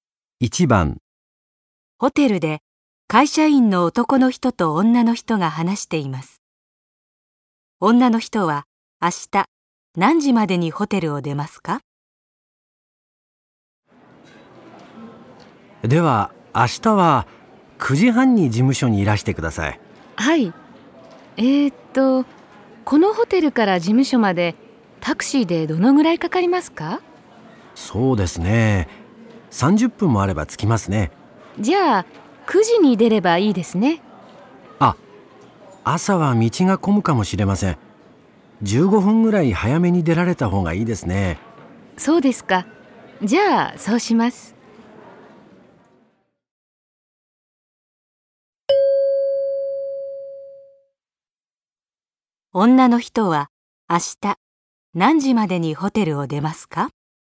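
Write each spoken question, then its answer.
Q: 女の人は明日何時までにホテルを出ますか?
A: 8時45分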